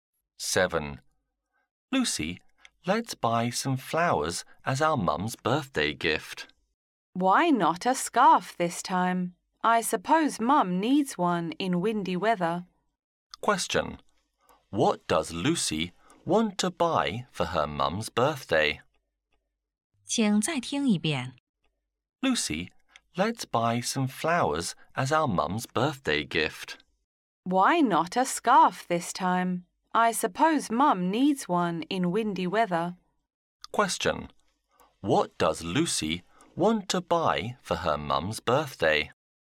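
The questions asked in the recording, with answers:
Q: What does Lucy want to buy for her mum's birthday?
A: A scarf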